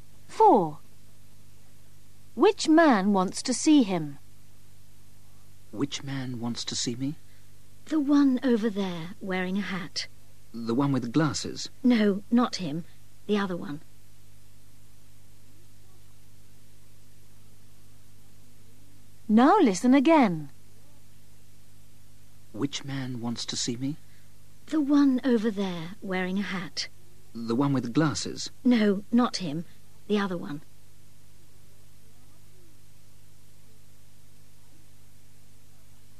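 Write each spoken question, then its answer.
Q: Which man wants to see him?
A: The man wearing a hat, not the one with glasses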